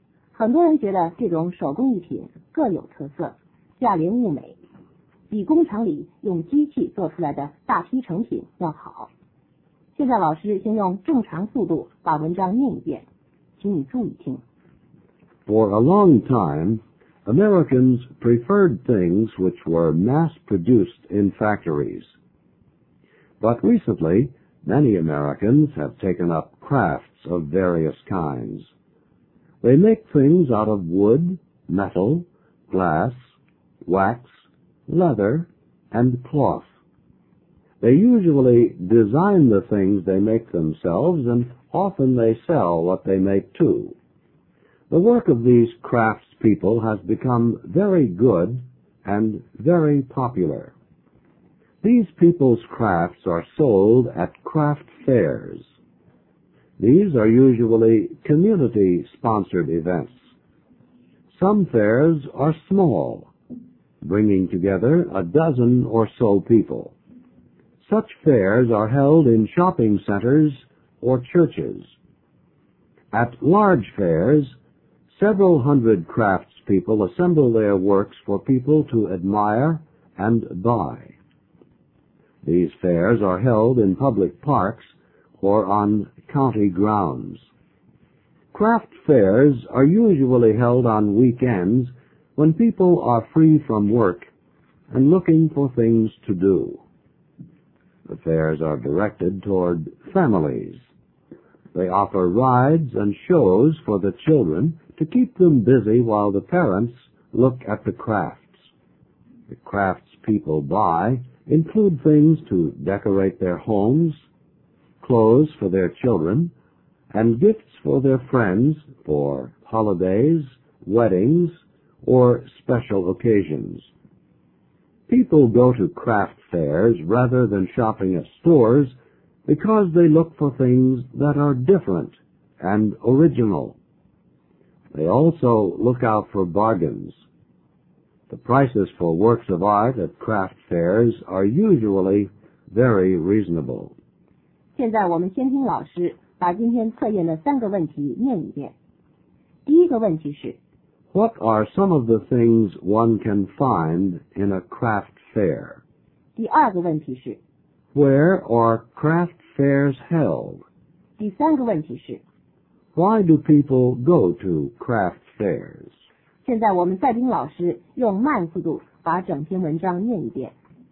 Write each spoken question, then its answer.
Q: What are some of the things one can find in a craft fair?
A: One can find things of wood, metal, glass, wax, leather, and cloth there.

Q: Where are craft fairs held?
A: They are held in shopping centers, churches, public parks, or county fairgrounds.

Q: Why do people go to craft fairs?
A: They go to buy things that are different, original, and not expensive.